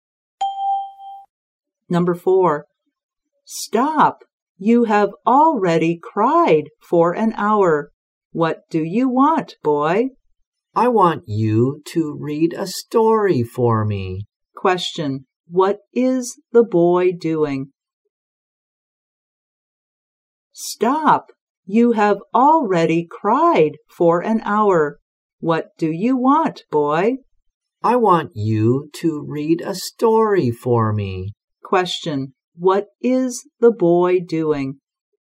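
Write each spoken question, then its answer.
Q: What is the boy doing?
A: Crying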